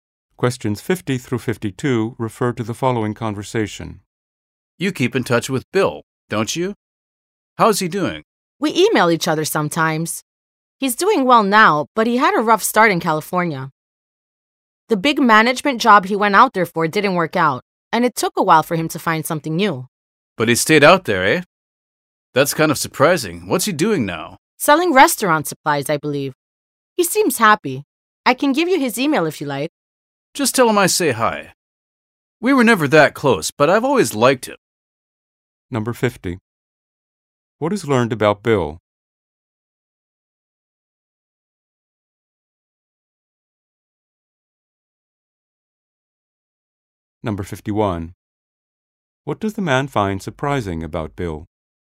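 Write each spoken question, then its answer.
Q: What does the man find surprising about Bill?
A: That he stayed in California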